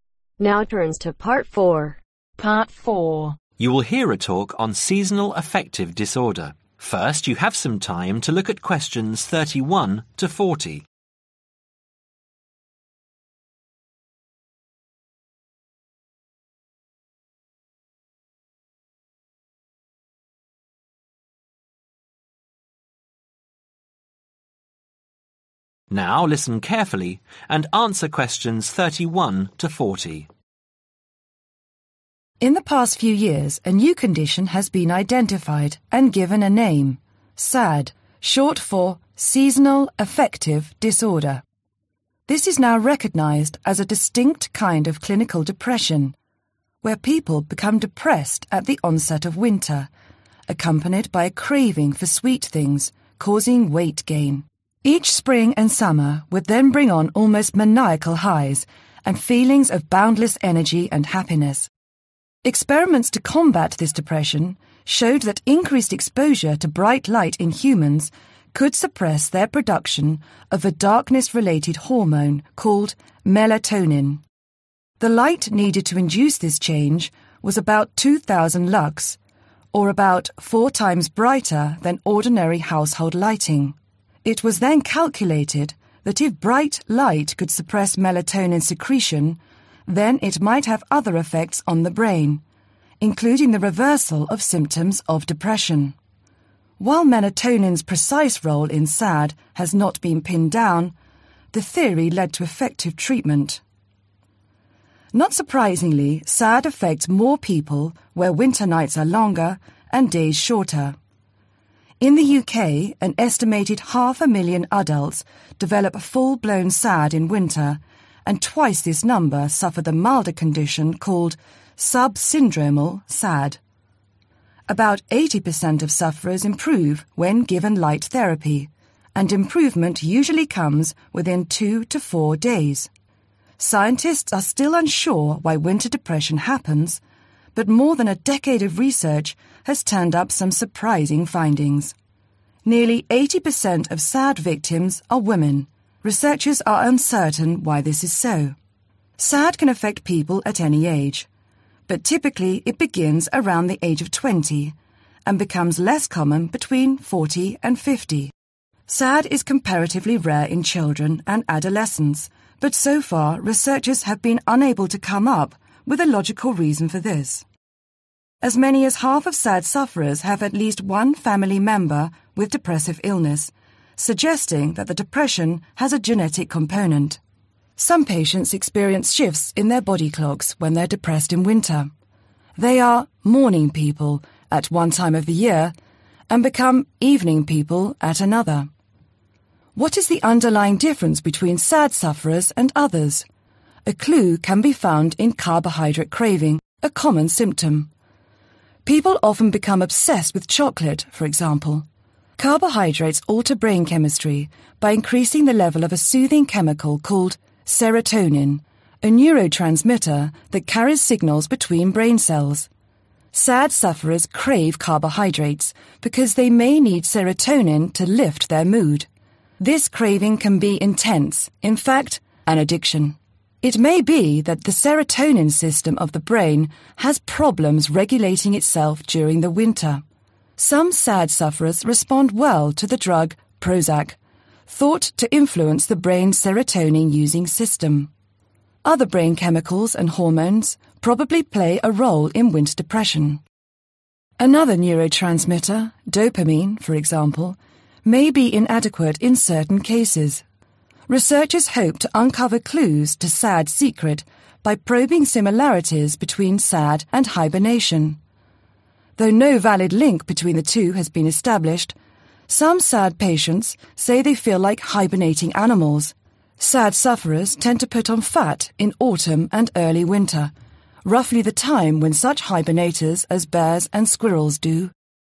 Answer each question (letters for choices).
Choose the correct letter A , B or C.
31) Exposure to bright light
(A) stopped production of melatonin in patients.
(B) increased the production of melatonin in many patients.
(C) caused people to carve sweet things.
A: A

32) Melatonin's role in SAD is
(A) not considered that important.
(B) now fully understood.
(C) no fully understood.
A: C

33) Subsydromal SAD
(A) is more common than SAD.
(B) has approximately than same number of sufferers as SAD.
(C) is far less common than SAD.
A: A

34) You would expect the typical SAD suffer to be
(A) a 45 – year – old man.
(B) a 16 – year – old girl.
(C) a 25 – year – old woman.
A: C

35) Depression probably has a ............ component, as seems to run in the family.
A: Genetic

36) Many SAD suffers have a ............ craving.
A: Carbohydrate/Chocolate

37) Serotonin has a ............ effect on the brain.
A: Soothing

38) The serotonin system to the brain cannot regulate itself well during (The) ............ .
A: Winter

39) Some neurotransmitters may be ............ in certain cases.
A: Inadequate

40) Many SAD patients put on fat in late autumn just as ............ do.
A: Hibernators